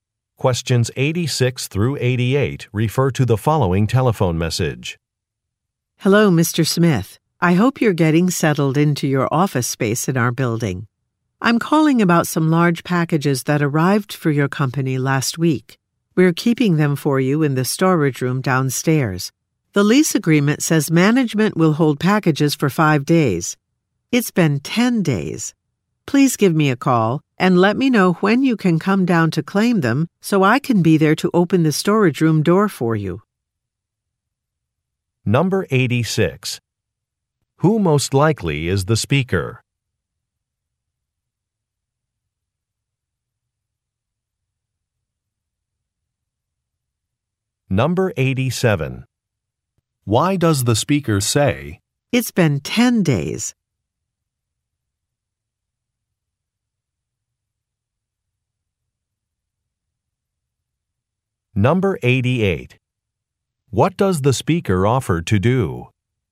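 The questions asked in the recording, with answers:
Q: Who most likely is the speaker?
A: A building manager.

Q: What does the speaker offer to do?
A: Open the storage room door.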